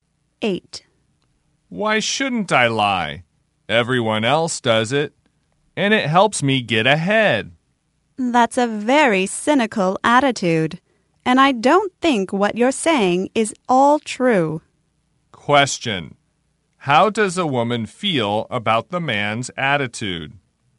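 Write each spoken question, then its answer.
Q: How does a woman feel about the man's attitude?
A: She thinks it is very cynical and not all true.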